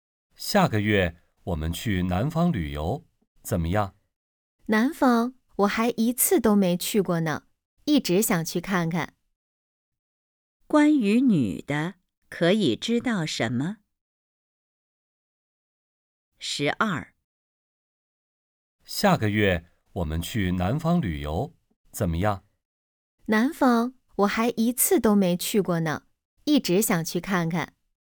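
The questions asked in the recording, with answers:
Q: 关于女的,可以知道什么?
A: 她没去过南方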